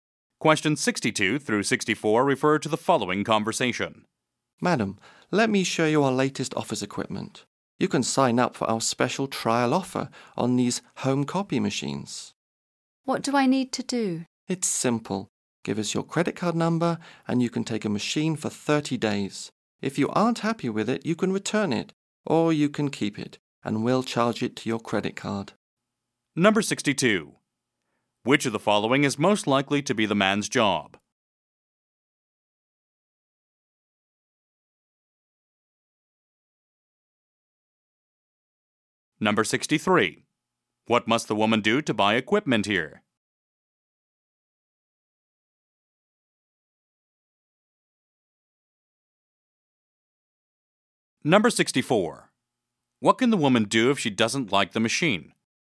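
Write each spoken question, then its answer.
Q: Which of the following is most likely to be the man's job?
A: Salesperson

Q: What must the woman do to buy equipment here?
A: Give her credit card number

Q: What can the woman do if she doesn't like the machine?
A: Return it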